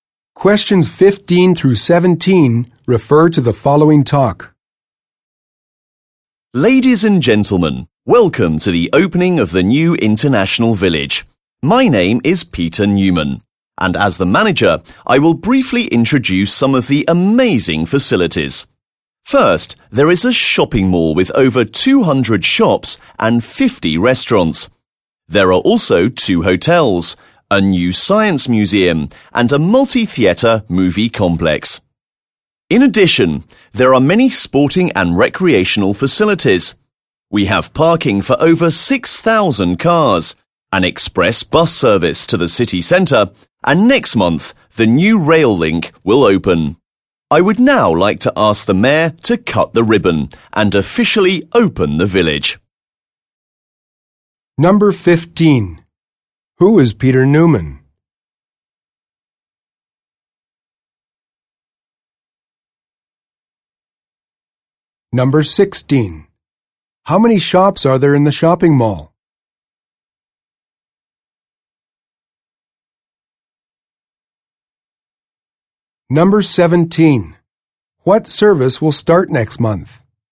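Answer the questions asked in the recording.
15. The manager of the International Village
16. Over 200
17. The new rail link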